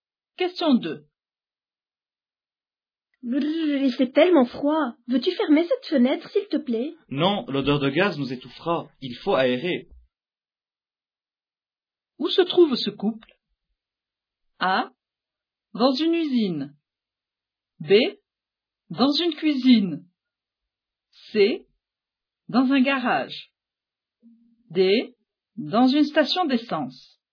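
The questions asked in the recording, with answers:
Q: Où se trouve ce couple?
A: B: Dans une cuisine.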